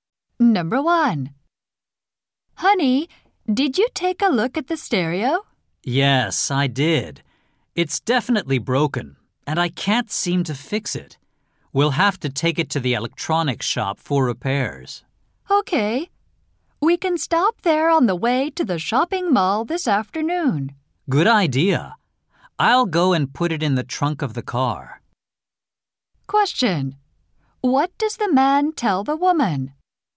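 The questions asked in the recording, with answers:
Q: What does the man tell the woman?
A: He will put the broken stereo in the car trunk to take it for repair.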